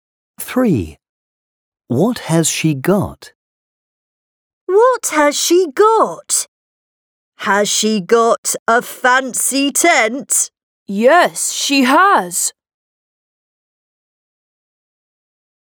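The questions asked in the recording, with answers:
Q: What has she got?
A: A fancy tent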